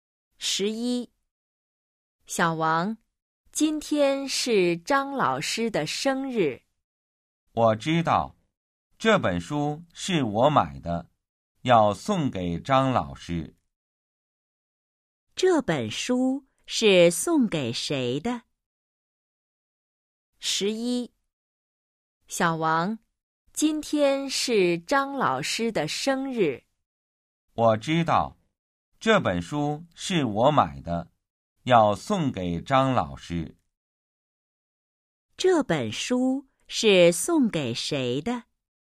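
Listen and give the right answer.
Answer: 张老师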